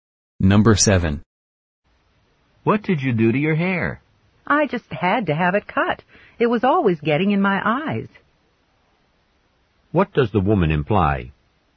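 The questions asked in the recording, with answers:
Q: What does the woman imply?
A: Her long hair was bothering her, so she had it cut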